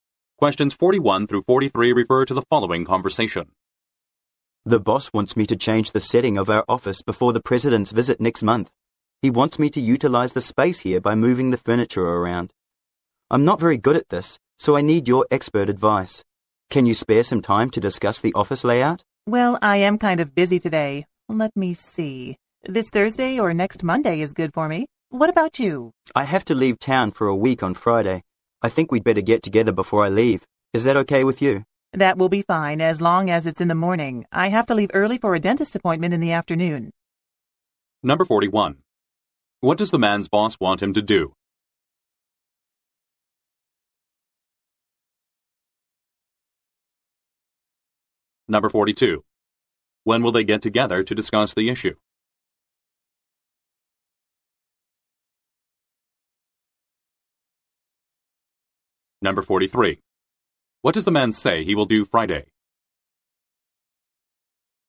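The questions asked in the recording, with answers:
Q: What does the man's boss want him to do?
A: Rearrange the office furniture before the president's visit

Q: When will they get together to discuss the issue?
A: Thursday morning

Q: What does the man say he will do Friday?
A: Leave town for a week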